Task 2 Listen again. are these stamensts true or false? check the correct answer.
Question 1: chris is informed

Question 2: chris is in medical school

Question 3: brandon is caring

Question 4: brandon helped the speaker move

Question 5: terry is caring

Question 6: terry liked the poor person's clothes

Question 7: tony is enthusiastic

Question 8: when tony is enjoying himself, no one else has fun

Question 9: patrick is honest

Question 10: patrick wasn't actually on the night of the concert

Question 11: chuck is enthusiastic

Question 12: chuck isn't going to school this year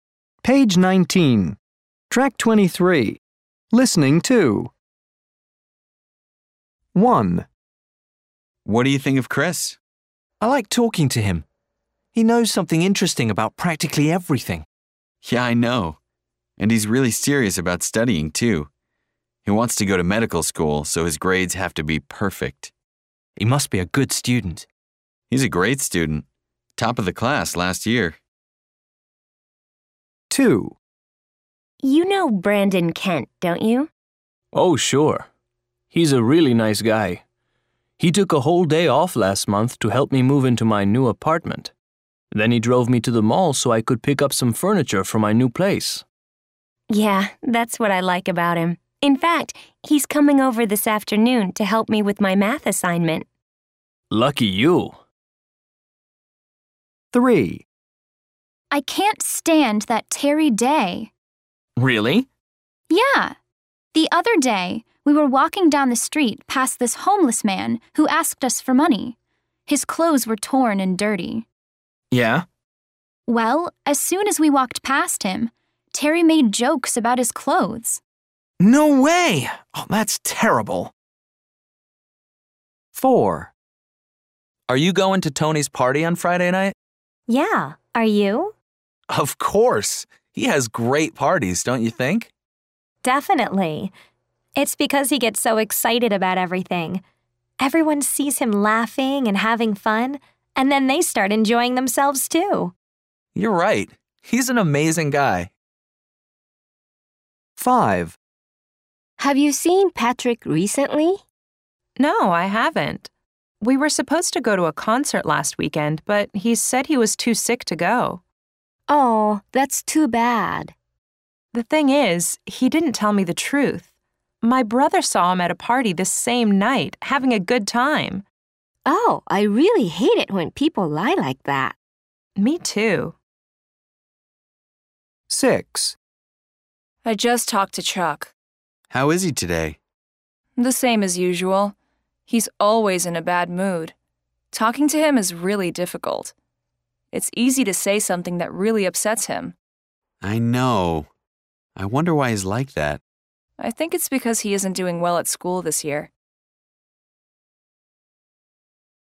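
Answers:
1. True
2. False
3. True
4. True
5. False
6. False
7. True
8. False
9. False
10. True
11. False
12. False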